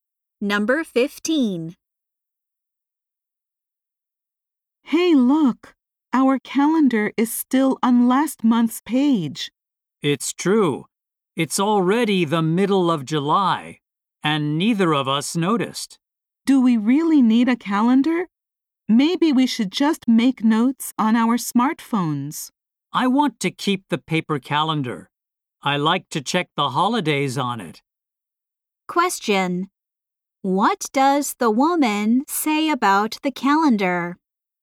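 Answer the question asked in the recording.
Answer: She wants to keep the paper calendar to check holidays.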